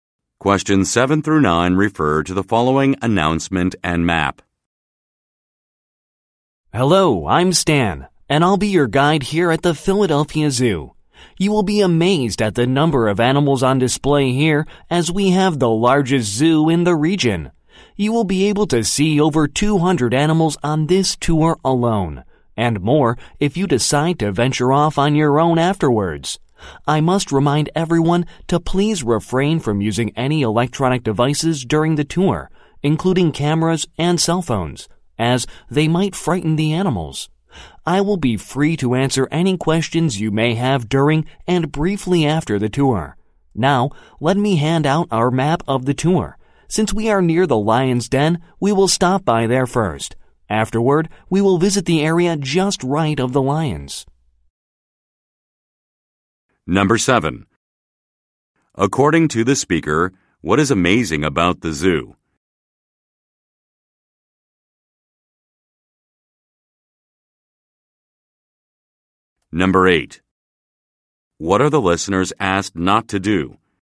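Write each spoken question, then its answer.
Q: According to the speaker, what is amazing about the zoo?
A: The number of animals; it is the largest zoo in the region

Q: What are the listeners asked not to do?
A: Use electronic devices such as cameras and cell phones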